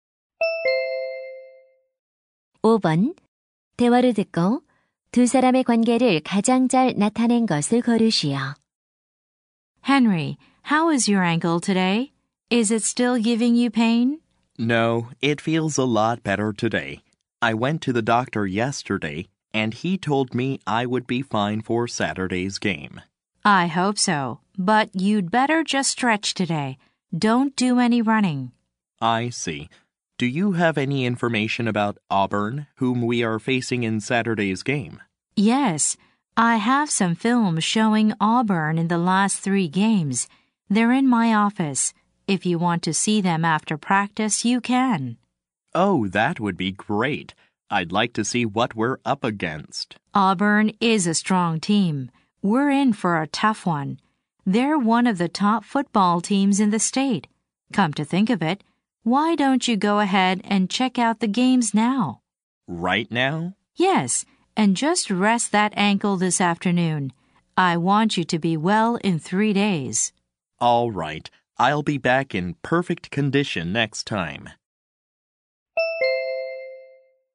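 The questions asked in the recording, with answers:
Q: 대화를 듣고 두 사람의 관계를 가장 잘 나타낸 것을 고르시오.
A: 미식축구 코치 - 선수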